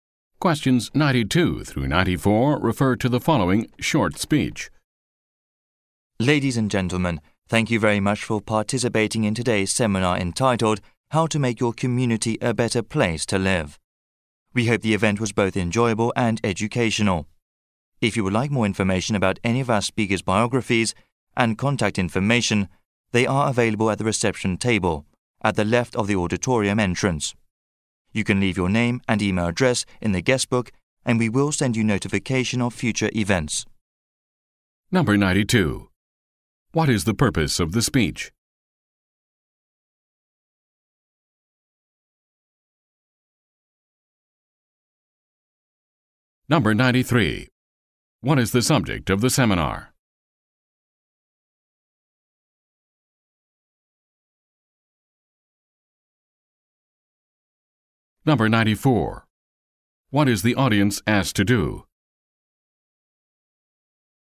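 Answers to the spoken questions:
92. To thank participants at the end of a seminar
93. How to make your community a better place to live
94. Leave their name and email in the guestbook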